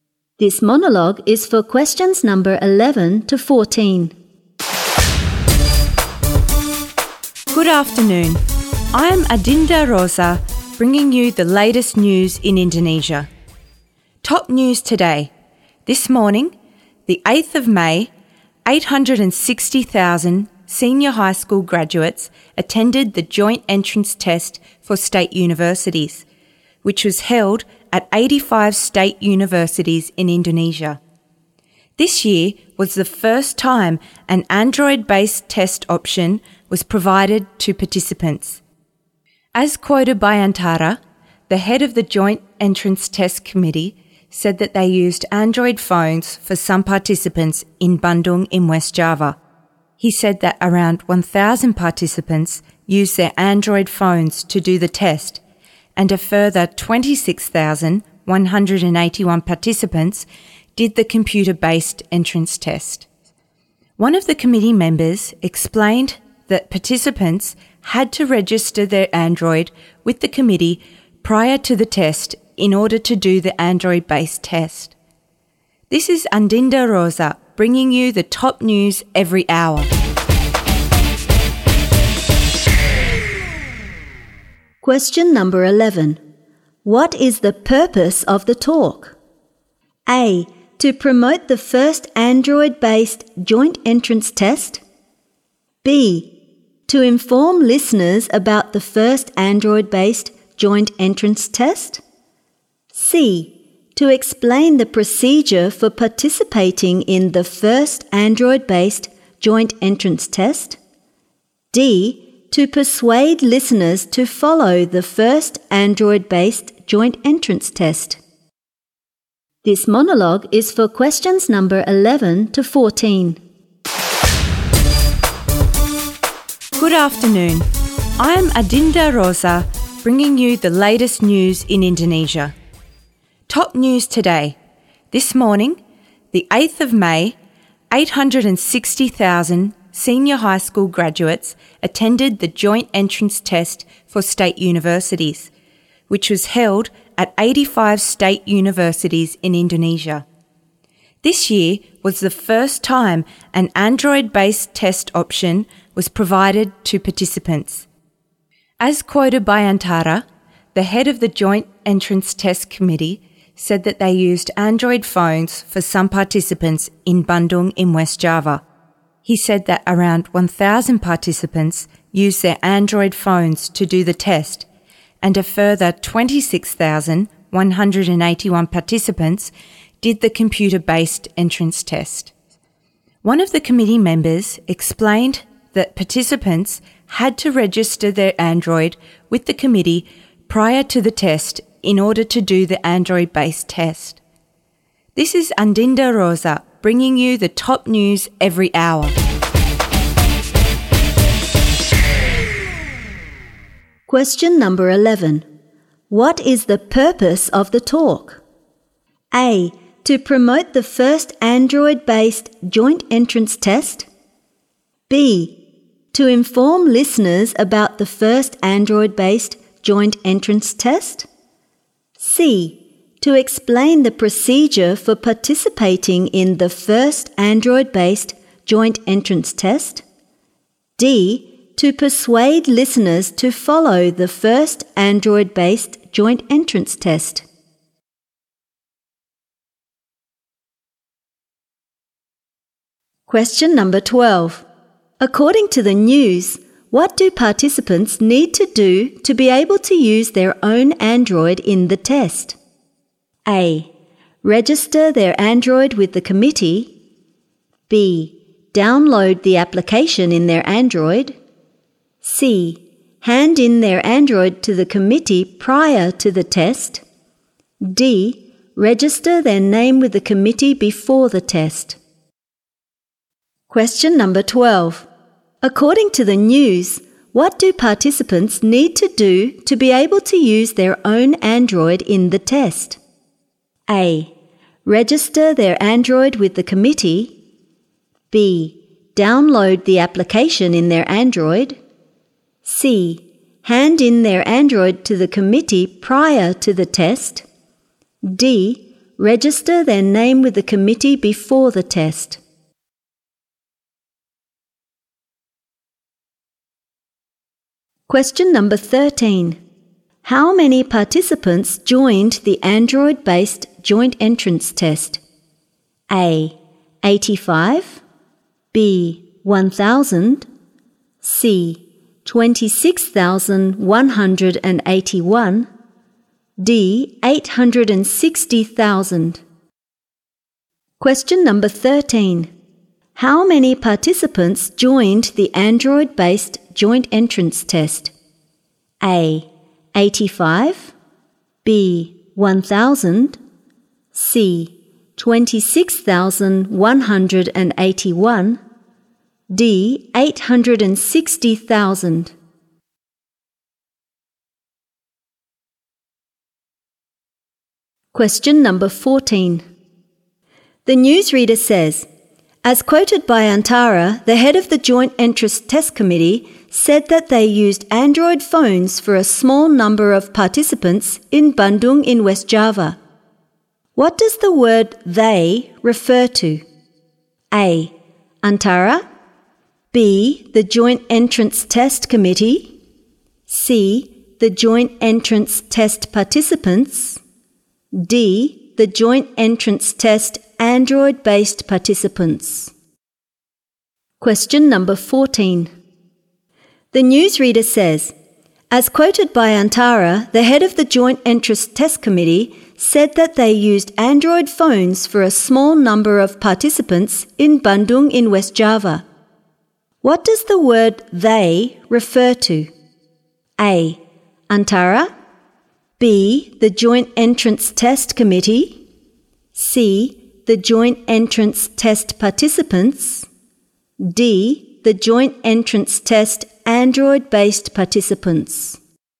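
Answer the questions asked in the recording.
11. B: To inform listeners about the first Android-based joint entrance test.
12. A: Register their Android with the committee.
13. B: 1,000
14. B: The Joint Entrance Test Committee.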